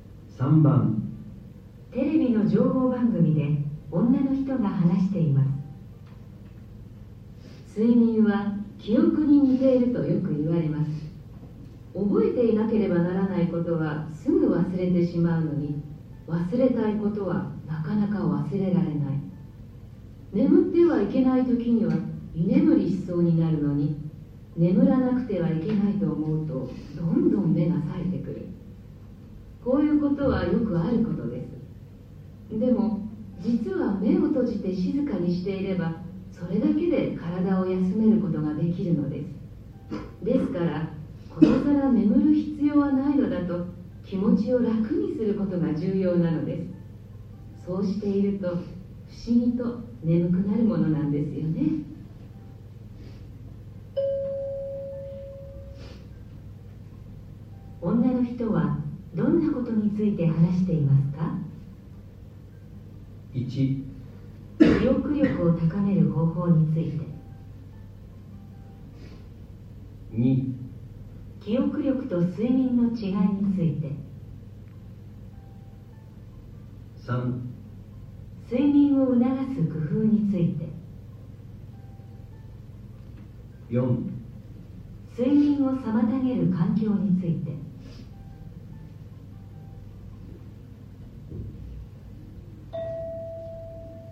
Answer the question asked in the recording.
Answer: 3

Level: N1 Listening · Test 1